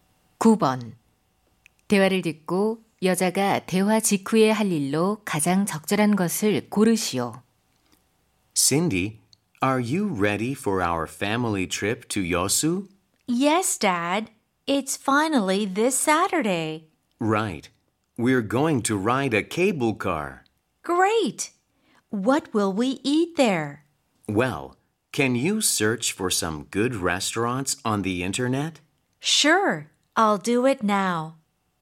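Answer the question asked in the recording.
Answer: 인터넷으로 좋은 식당 검색하기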